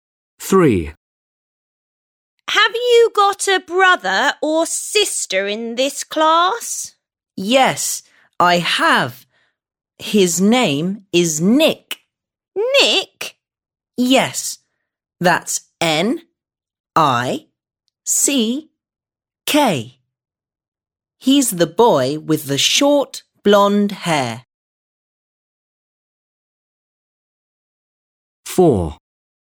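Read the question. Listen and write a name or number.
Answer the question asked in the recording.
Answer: Nick

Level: 3. Sınıf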